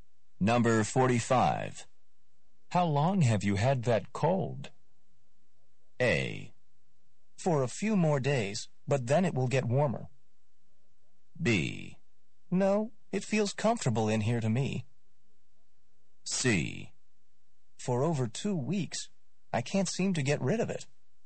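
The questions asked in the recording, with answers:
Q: How long have you had that cold?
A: C: For over 2 weeks, I can't seem to get rid of it.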